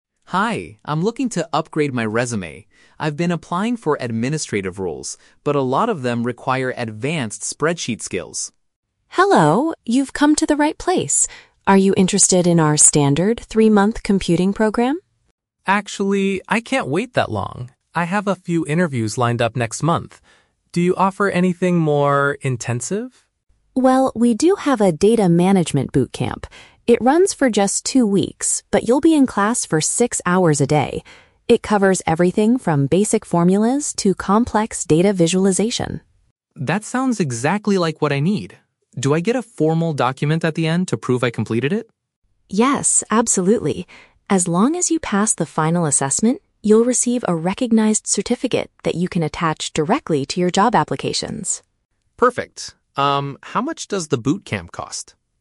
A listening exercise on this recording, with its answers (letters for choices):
Listen to the conversation between a job seeker and a training center counselor. Choose the correct answer (A, B, or C) for each question.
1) Why is the man visiting the training center?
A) To apply for a job as an administrative assistant at the center.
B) To acquire a specific technical skill to make his job applications stronger.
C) To prepare for a university entrance exam on data management.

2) Why does the man reject the standard computing program?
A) The tuition fee for the three-month class is too expensive.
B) The program does not cover the advanced formulas he wants to learn.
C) He needs to finish his training much faster due to upcoming opportunities.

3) What is the condition for receiving the official document?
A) He must successfully complete a test at the end of the course.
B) He needs to attend classes for six hours every single day.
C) He has to pay an extra fee to have the certificate printed.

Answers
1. B
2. C
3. A

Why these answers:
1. Daniel says he wants to "upgrade my resume" and needs "advanced spreadsheet skills". Option (B) accurately paraphrases this (acquire a technical skill = spreadsheet skills; make applications stronger = upgrade resume). Option (A) is The Trap: The word "administrative" is used in the audio, but he is applying for those roles at other companies, not at the training center. Option (C) is plausible but not mentioned.
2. Daniel says "I can't wait that long" (finish much faster) because he has "interviews lined up next month" (upcoming opportunities). Option (A) is not mentioned. Option (B) is The Trap: "Formulas" are mentioned later when discussing the Bootcamp, but this is not the reason he rejects the standard program; time is the only reason.
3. Jessica states that he will get the certificate "As long as you pass the final assessment". Option (A) uses synonyms for this condition (successfully complete a test = pass the final assessment). Option (B) is The Trap: She mentions he will be in class for "six hours a day", but she does not explicitly state that perfect attendance is the condition for the certificate; passing the test is. Option (C) is not mentioned.

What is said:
Daniel: Hi, I'm looking to upgrade my resume. I've been applying for administrative roles, but a lot of them require advanced spreadsheet skills.
Jessica: Hello! You've come to the right place. Are you interested in our standard three-month computing program?
Daniel: Actually, I can't wait that long. I have a few interviews lined up next month. Do you offer anything more... intensive?
Jessica: Well, we do have a "Data Management Bootcamp". It runs for just two weeks, but you'll be in class for six hours a day. It covers everything from basic formulas to complex data visualization.
Daniel: That sounds exactly like what I need. Do I get a formal document at the end to prove I completed it?
Jessica: Yes, absolutely. As long as you pass the final assessment, you'll receive a recognized certificate that you can attach directly to your job applications.